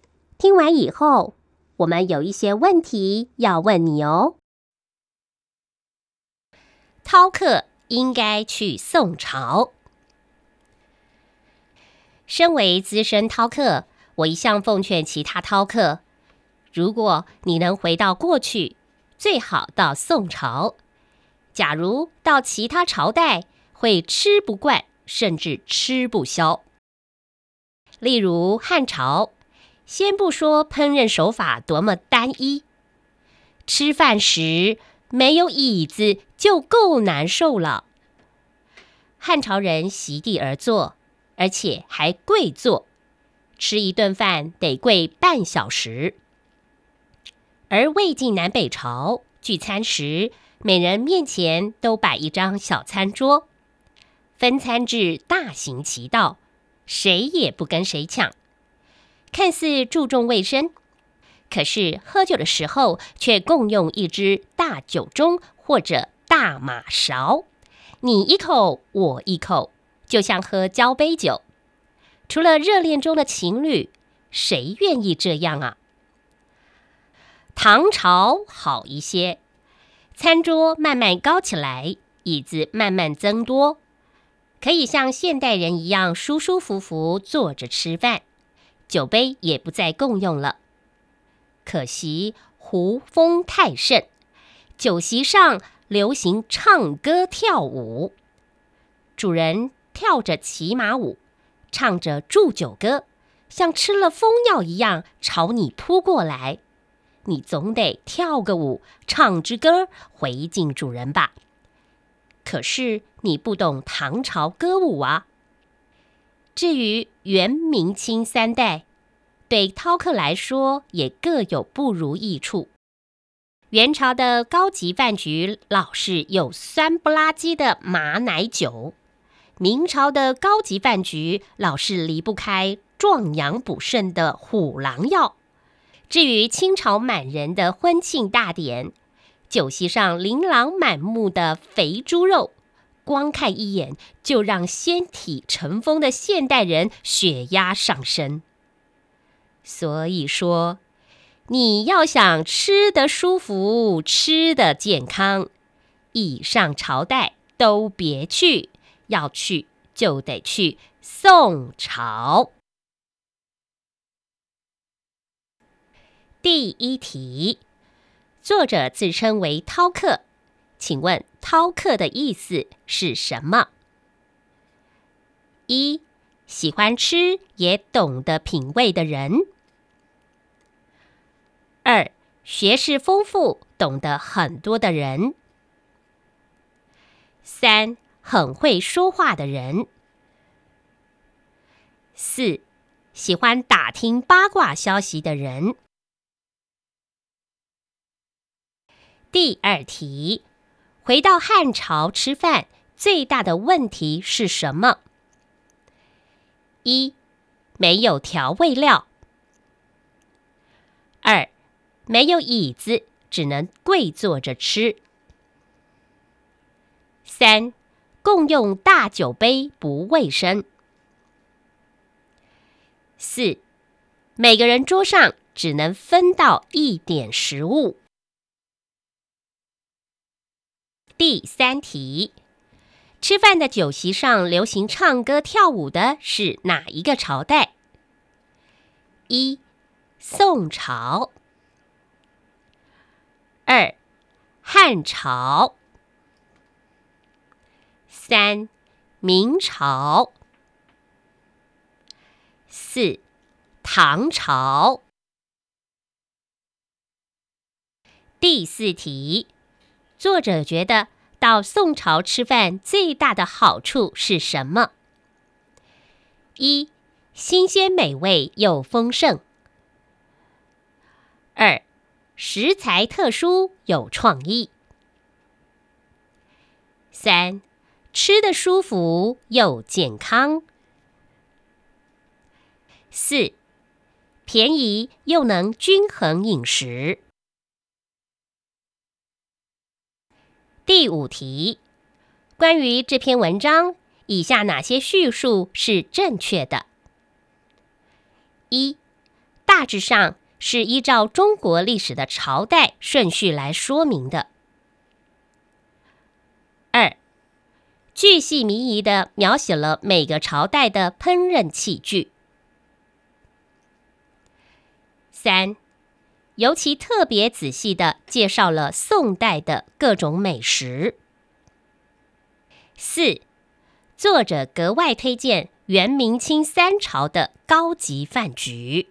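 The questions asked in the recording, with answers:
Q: 作者自称为饕客,请问饕客的意思是什么?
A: 1: 喜欢吃也懂得品味的人

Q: 回到汉朝吃饭最大的问题是什么?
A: 2: 没有椅子,只能跪坐着吃

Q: 吃饭的酒席上流行唱歌跳舞的是哪一个朝代?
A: 4: 唐朝

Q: 作者觉得到宋朝吃饭最大的好处是什么?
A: 3: 吃得舒服又健康

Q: 关于这篇文章,以下哪些叙述是正确的?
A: 1: 大致上是依照中国历史的朝代顺序来说明的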